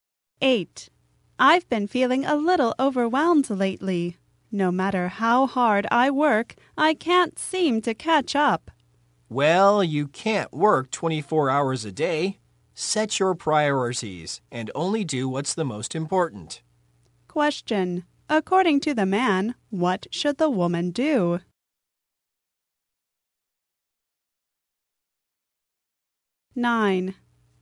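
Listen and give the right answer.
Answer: Set her priorities and only do the most important things.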